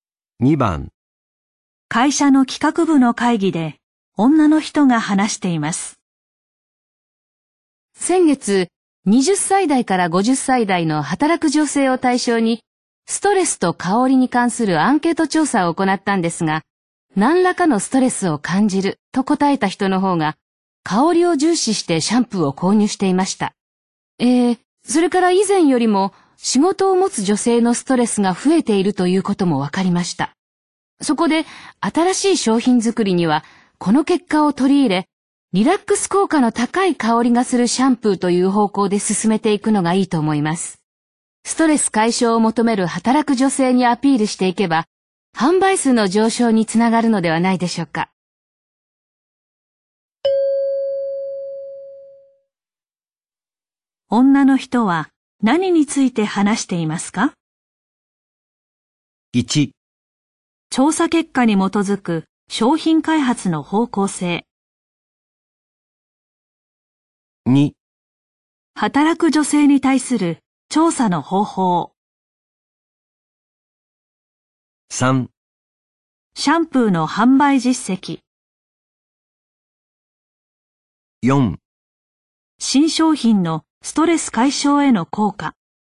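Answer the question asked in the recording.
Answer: 1: 調査結果に基づく商品開発の方向性。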